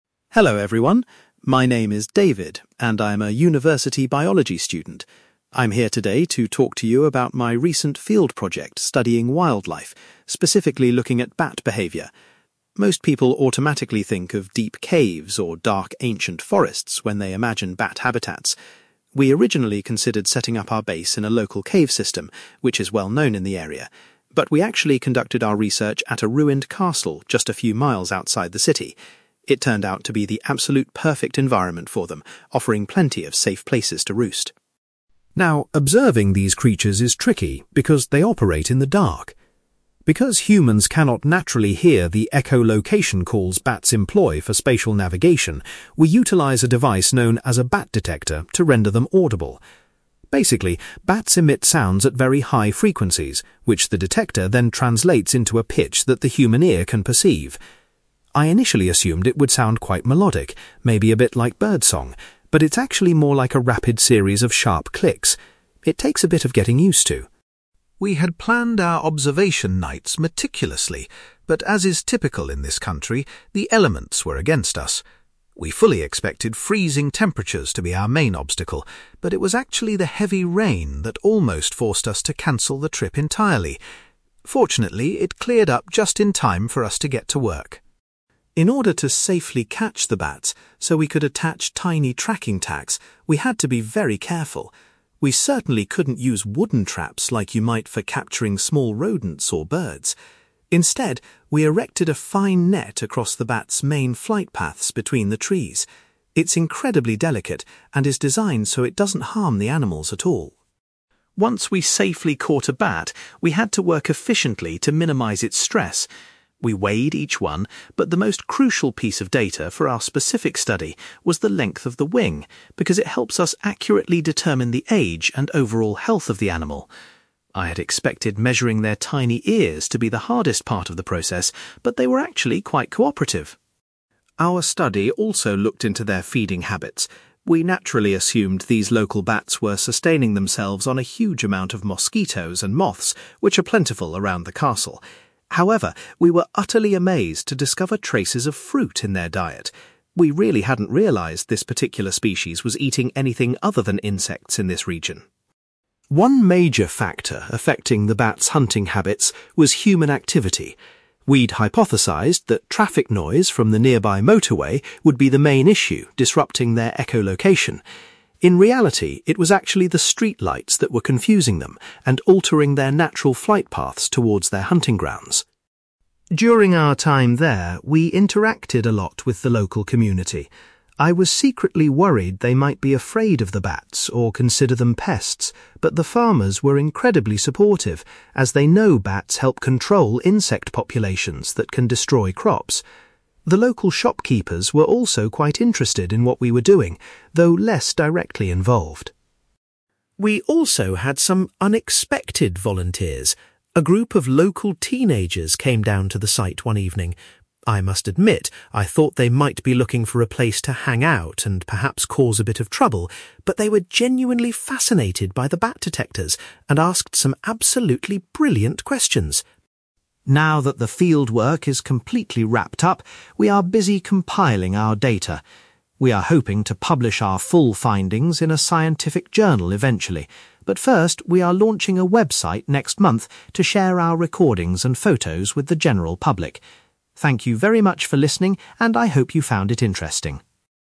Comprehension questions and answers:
You will hear a university student called David giving a presentation about a field trip studying bats. For questions 9-18, complete the sentences with a word or short phrase.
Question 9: David's research was based at a (9)........................... rather than in a cave.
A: ruined castle

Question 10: David used a bat detector to translate the high (10)........................... of bat calls into audible clicks.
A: frequencies

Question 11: David says that (11)........................... almost caused the trip to be cancelled.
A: heavy rain

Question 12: The researchers used a (12)........................... to safely capture the bats.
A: fine net

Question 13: Measuring the bat's (13)........................... provided the most important data for the study.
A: wing

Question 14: David was surprised to find that the bats' diet included (14)........................... .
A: fruit

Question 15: The bats' flight paths were being negatively affected by (15)........................... in the area.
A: street lights

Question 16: The local (16)........................... were very supportive of the bat research.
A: farmers

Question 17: David was impressed by the interest shown by a group of (17)........................... who visited the site.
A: teenagers

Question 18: David plans to share his research through a (18)........................... before publishing in a journal.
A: website

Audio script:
David: Hello everyone. My name is David, and I'm a university biology student. I'm here today to talk to you about my recent field project studying wildlife, specifically looking at bat behaviour. Most people automatically think of deep caves or dark, ancient forests when they imagine bat habitats. We originally considered setting up our base in a local cave system, which is well-known in the area, but we actually conducted our research at a ruined castle just a few miles outside the city. It turned out to be the absolute perfect environment for them, offering plenty of safe places to roost.
Now, observing these creatures is tricky because they operate in the dark. Because humans cannot naturally hear the echolocation calls bats employ for spatial navigation, we utilize a device known as a bat detector to render them audible. Basically, bats emit sounds at very high frequencies, which the detector then translates into a pitch that the human ear can perceive. I initially assumed it would sound quite melodic, maybe a bit like bird song, but it's actually more like a rapid series of sharp clicks. It takes a bit of getting used to!
We had planned our observation nights meticulously, but as is typical in this country, the elements were against us. We fully expected freezing temperatures to be our main obstacle, but it was actually the heavy rain that almost forced us to cancel the trip entirely. Fortunately, it cleared up just in time for us to get to work.
In order to safely catch the bats so we could attach tiny tracking tags, we had to be very careful. We certainly couldn't use wooden traps like you might for capturing small rodents or birds. Instead, we erected a fine net across the bats' main flight paths between the trees. It's incredibly delicate and is designed so it doesn't harm the animals at all.
Once we safely caught a bat, we had to work efficiently to minimise its stress. We weighed each one, but the most crucial piece of data for our specific study was the length of the wing, because it helps us accurately determine the age and overall health of the animal. I had expected measuring their tiny ears to be the hardest part of the process, but they were actually quite cooperative!
Our study also looked into their feeding habits. We naturally assumed these local bats were sustaining themselves on a huge amount of mosquitoes and moths, which are plentiful around the castle. However, we were utterly amazed to discover traces of fruit in their diet. We really hadn't realised this particular species was eating anything other than insects in this region.
One major factor affecting the bats' hunting habits was human activity. We'd hypothesised that traffic noise from the nearby motorway would be the main issue disrupting their echolocation. In reality, it was actually the street lights that were confusing them and altering their natural flight paths towards their hunting grounds.
During our time there, we interacted a lot with the local community. I was secretly worried they might be afraid of the bats or consider them pests, but the farmers were incredibly supportive, as they know bats help control insect populations that can destroy crops. The local shopkeepers were also quite interested in what we were doing, though less directly involved.
We also had some unexpected volunteers. A group of local teenagers came down to the site one evening. I must admit, I thought they might be looking for a place to hang out and perhaps cause a bit of trouble, but they were genuinely fascinated by the bat detectors and asked some absolutely brilliant questions.
Now that the fieldwork is completely wrapped up, we are busy compiling our data. We are hoping to publish our full findings in a scientific journal eventually, but first, we are launching a website next month to share our recordings and photos with the general public. Thank you very much for listening, and I hope you found it interesting!

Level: B2